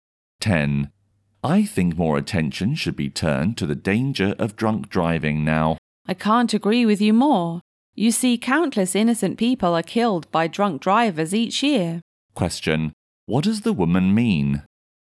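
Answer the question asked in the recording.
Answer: She completely agrees that drunk driving needs more attention.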